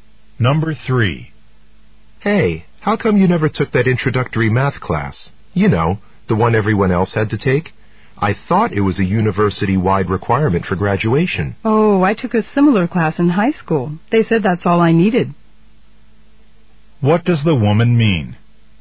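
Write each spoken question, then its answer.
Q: What does the woman mean?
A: Her high school math class satisfied the requirement.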